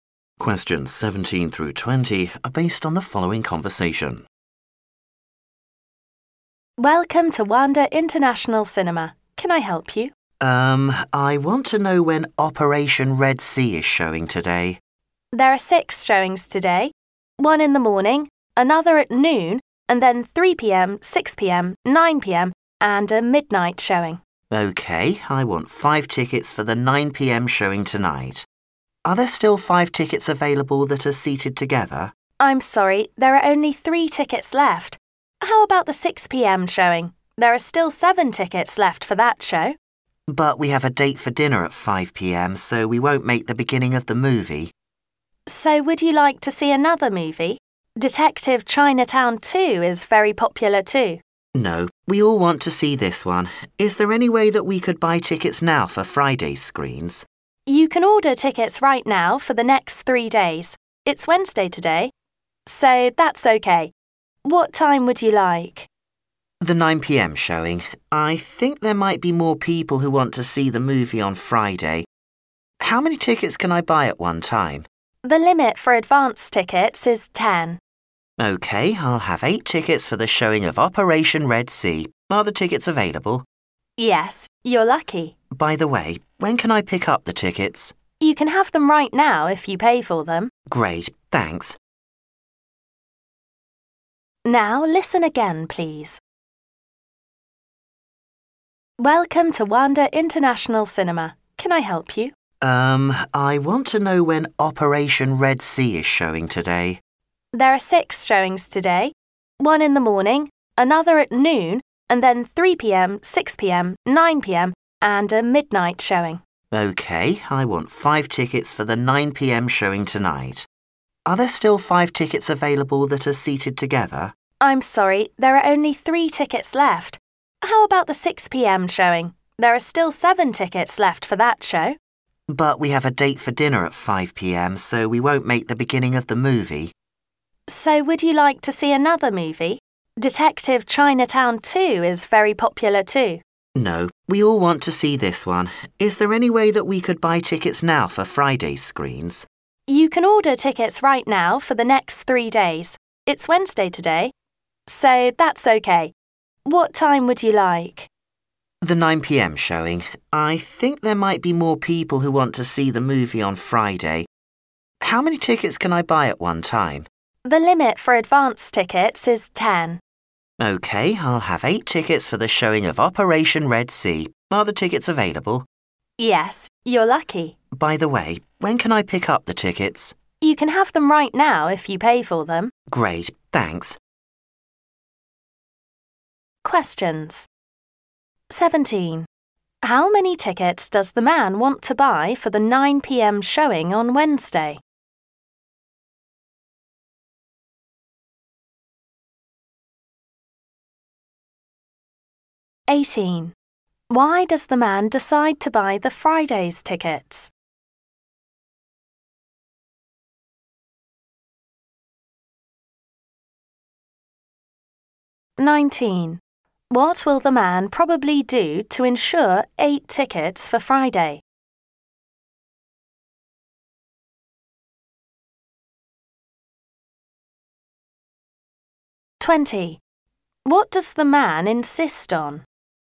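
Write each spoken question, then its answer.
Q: Why does the man decide to buy the Friday's tickets?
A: Only 3 tickets were left for 9 p.m. and dinner clashed with 6 p.m.

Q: What does the man insist on?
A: Seeing Operation Red Sea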